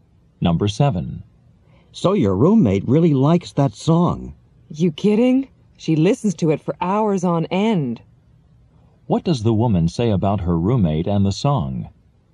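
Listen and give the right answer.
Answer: She listens to it for hours at a time.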